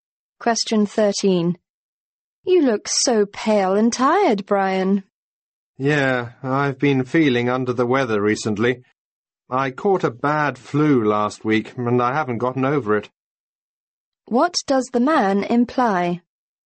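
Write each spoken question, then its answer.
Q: What does the man imply?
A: He is still ill from the flu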